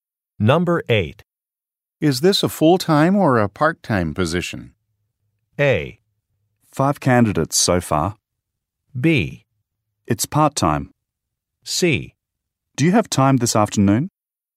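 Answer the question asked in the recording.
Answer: B: It's part-time.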